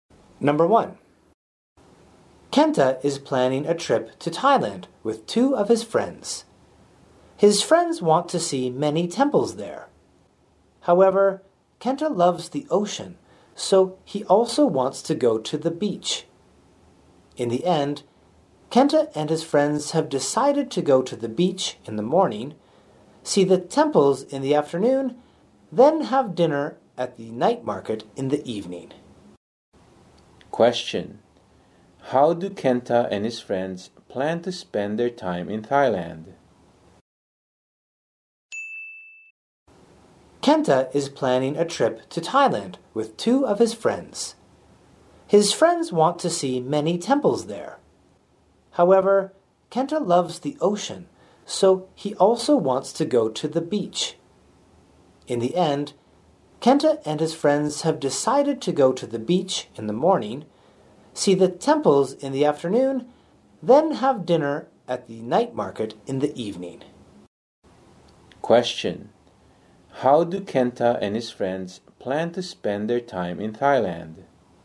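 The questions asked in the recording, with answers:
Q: how do Kenta and his friends plan to spend their time in Thailand?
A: Beach in the morning, temples in the afternoon, then dinner at the night market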